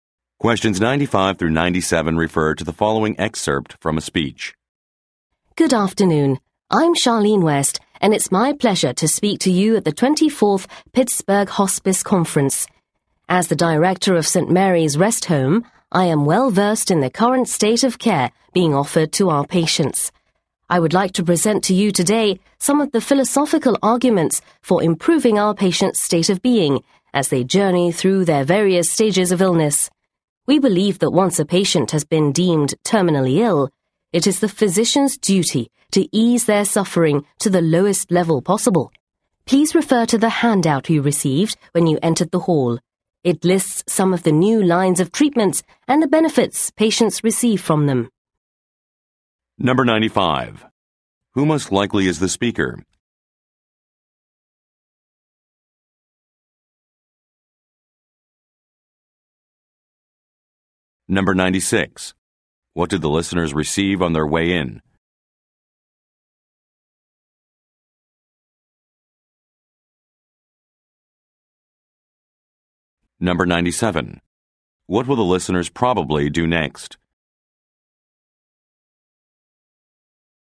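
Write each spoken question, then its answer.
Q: Who most likely is the speaker?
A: The director of a rest home

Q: What did the listeners receive on their way in?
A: A handout

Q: What will the listeners probably do next?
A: Look at the handout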